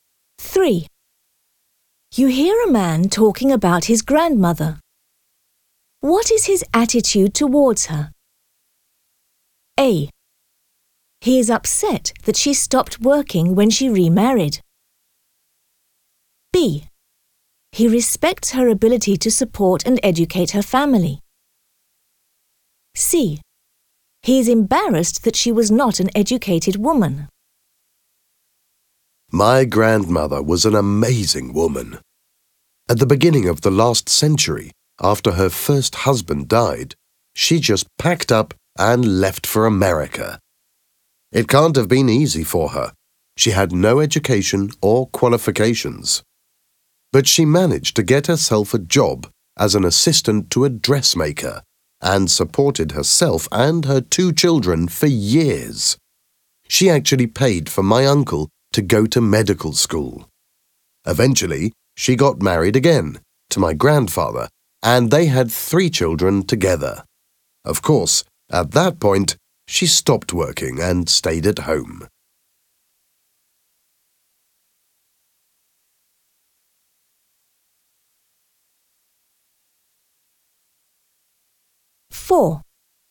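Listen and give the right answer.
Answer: B: He respects her ability to support and educate her family.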